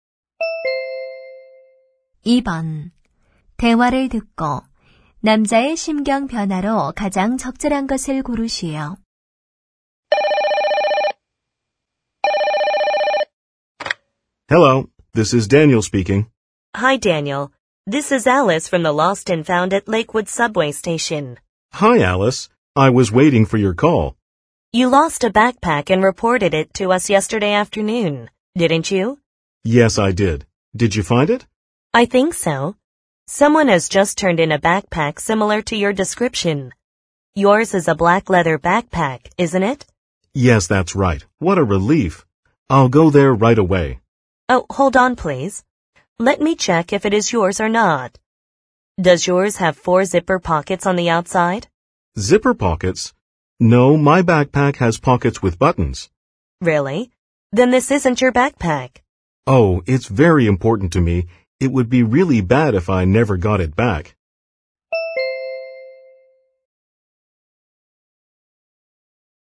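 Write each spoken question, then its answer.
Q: 대화를 듣고 남자의 심경 변화로 가장 적절한 것을 고르시오.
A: 안도했다가 실망함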